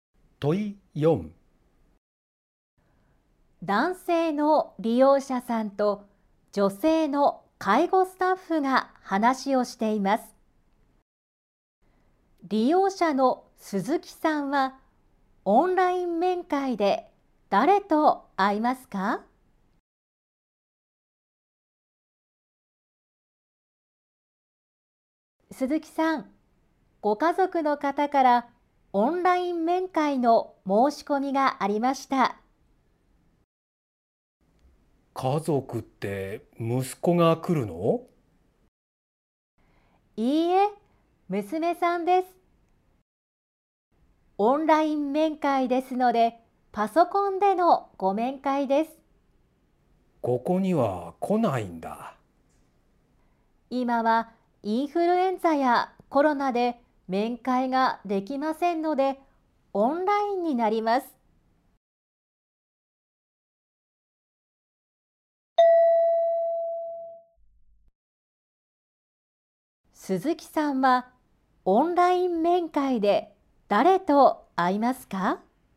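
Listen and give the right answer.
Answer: 娘さん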